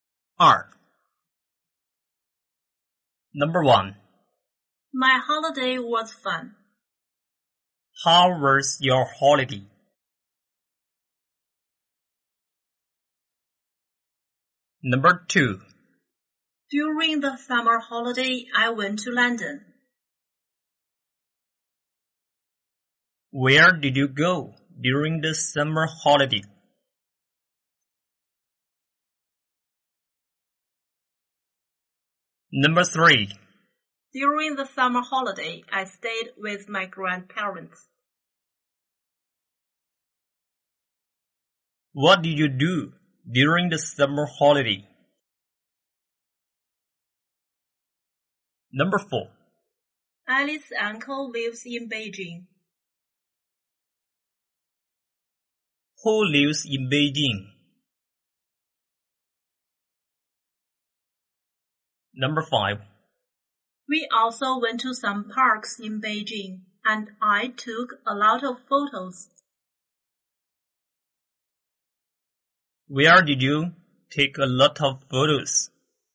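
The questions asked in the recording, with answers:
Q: How was your holiday?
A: It was fun.

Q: Where did you go during the summer holiday?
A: London.

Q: What did you do during the summer holiday?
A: I stayed with my grandparents.

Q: Who lives in Beijing?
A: Alice's uncle.

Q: Where did you take a lot of photos?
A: In some parks in Beijing.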